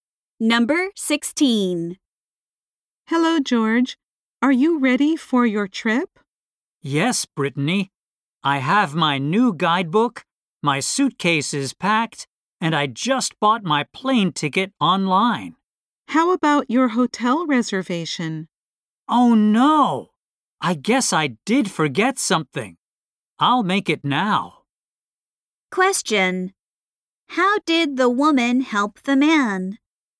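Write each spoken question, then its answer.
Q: How did the woman help the man?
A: She reminded him about his hotel reservation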